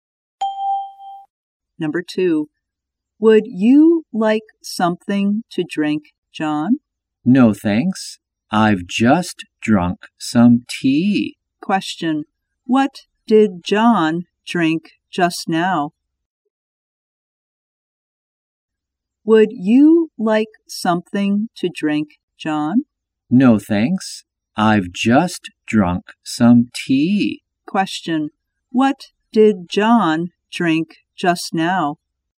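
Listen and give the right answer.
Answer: Some tea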